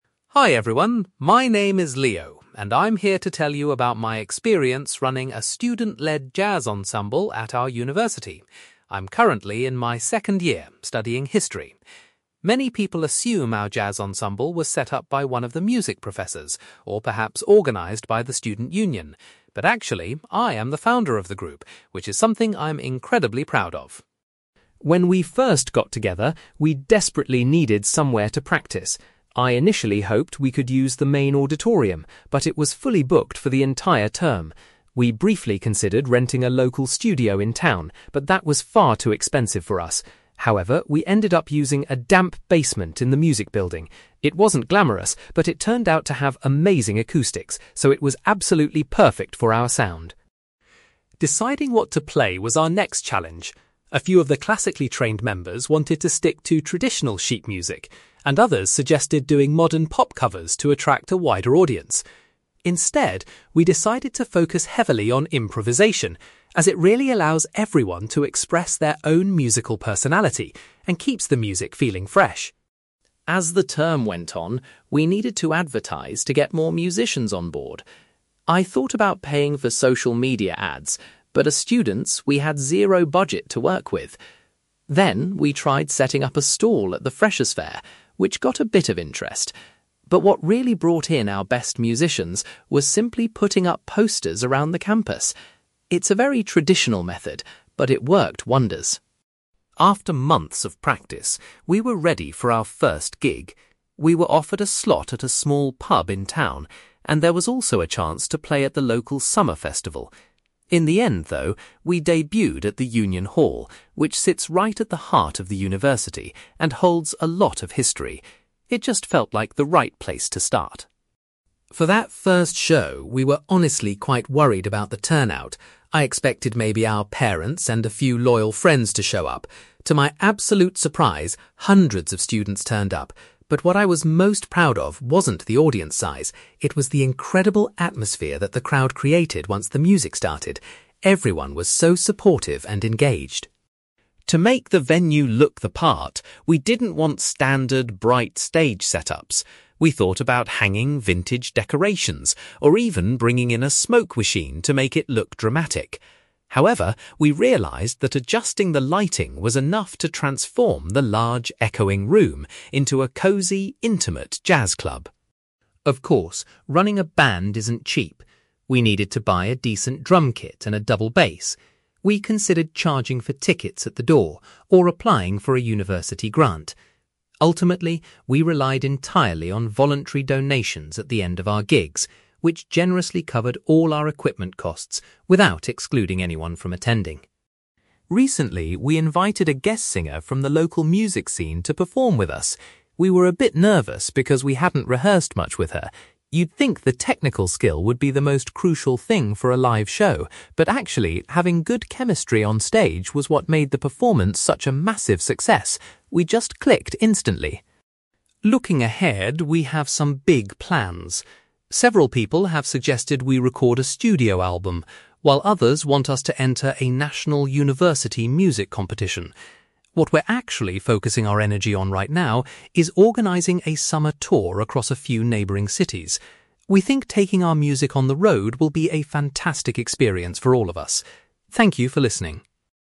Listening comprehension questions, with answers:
You will hear a student called Leo giving a presentation about a jazz ensemble he runs at his university. For questions 9-18, complete the sentences with a word or short phrase.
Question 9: People are often surprised to learn that Leo is the (9)........................... of the jazz ensemble.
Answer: founder

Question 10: The group's first rehearsals took place in a (10)........................... located in the music building.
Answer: basement

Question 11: Leo says the ensemble decided to concentrate on (11)........................... rather than playing traditional written music.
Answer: improvisation

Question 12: Leo found that using (12)........................... was the most effective way to recruit new musicians.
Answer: posters

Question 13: The ensemble's very first public performance was held at the (13)........................... .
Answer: Union Hall

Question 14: Leo was particularly delighted by the (14)........................... generated by the audience at their first gig.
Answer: atmosphere

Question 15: Leo explains that changing the (15)........................... helped to give the venue the feel of an authentic jazz club.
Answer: lighting

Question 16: The ensemble was able to buy musical instruments using (16)........................... from the audience.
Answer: donations

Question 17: Leo believes that a shared (17)........................... was the main reason the performance with the guest singer was successful.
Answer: chemistry

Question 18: Leo says the group's current priority is preparing for a (18)........................... .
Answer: summer tour

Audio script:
Leo: Hi everyone, my name is Leo, and I'm here to tell you about my experience running a student-led jazz ensemble at our university. I'm currently in my second year, studying history. Many people assume our jazz ensemble was set up by one of the music professors, or perhaps organised by the student union. But actually, I am the founder of the group, which is something I'm incredibly proud of.
When we first got together, we desperately needed somewhere to practise. I initially hoped we could use the main auditorium, but it was fully booked for the entire term. We briefly considered renting a local studio in town, but that was far too expensive for us. However, we ended up using a damp basement in the music building. It wasn't glamorous, but it turned out to have amazing acoustics, so it was absolutely perfect for our sound.
Deciding what to play was our next challenge. A few of the classically trained members wanted to stick to traditional sheet music, and others suggested doing modern pop covers to attract a wider audience. Instead, we decided to focus heavily on improvisation, as it really allows everyone to express their own musical personality and keeps the music feeling fresh.
As the term went on, we needed to advertise to get more musicians on board. I thought about paying for social media ads, but as students, we had zero budget to work with. Then, we tried setting up a stall at the freshers' fair, which got a bit of interest. But what really brought in our best musicians was simply putting up posters around the campus. It's a very traditional method, but it worked wonders!
After months of practice, we were ready for our first gig. We were offered a slot at a small pub in town, and there was also a chance to play at the local summer festival. In the end, though, we debuted at the Union Hall, which sits right at the heart of the university and holds a lot of history. It just felt like the right place to start.
For that first show, we were honestly quite worried about the turnout. I expected maybe our parents and a few loyal friends to show up. To my absolute surprise, hundreds of students turned up. But what I was most proud of wasn't the audience size, it was the incredible atmosphere that the crowd created once the music started. Everyone was so supportive and engaged.
To make the venue look the part, we didn't want standard, bright stage setups. We thought about hanging vintage decorations or even bringing in a smoke machine to make it look dramatic. However, we realised that adjusting the lighting was enough to transform the large, echoing room into a cozy, intimate jazz club.
Of course, running a band isn't cheap. We needed to buy a decent drum kit and a double bass. We considered charging for tickets at the door, or applying for a university grant. Ultimately, we relied entirely on voluntary donations at the end of our gigs, which generously covered all our equipment costs without excluding anyone from attending.
Recently, we invited a guest singer from the local music scene to perform with us. We were a bit nervous because we hadn't rehearsed much with her. You'd think the technical skill would be the most crucial thing for a live show, but actually, having good chemistry on stage was what made the performance such a massive success. We just clicked instantly.
Looking ahead, we have some big plans. Several people have suggested we record a studio album, while others want us to enter a national university music competition. What we're actually focusing our energy on right now is organising a summer tour across a few neighbouring cities. We think taking our music on the road will be a fantastic experience for all of us. Thank you for listening!

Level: B2